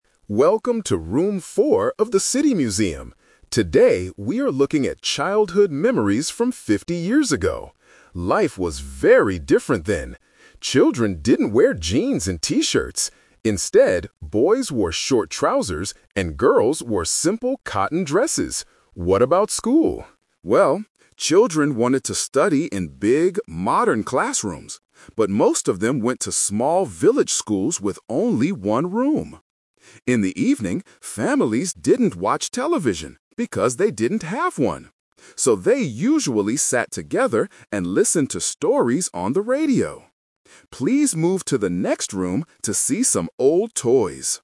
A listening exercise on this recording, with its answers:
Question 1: What did boys usually wear fifty years ago?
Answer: Short trousers

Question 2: Where did most children go to school?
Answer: In small village schools

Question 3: What did families do in the evening?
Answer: They listened to the radio.

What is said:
Welcome to Room 4 of the City Museum. Today, we are looking at childhood memories from fifty years ago. Life was very different then. Children didn't wear jeans and T-shirts. Instead, boys wore short trousers, and girls wore simple cotton dresses. What about school? Well, children wanted to study in big, modern classrooms, but most of them went to small village schools with only one room. In the evening, families didn't watch television because they didn't have one! So, they usually sat together and listened to stories on the radio. Please move to the next room to see some old toys.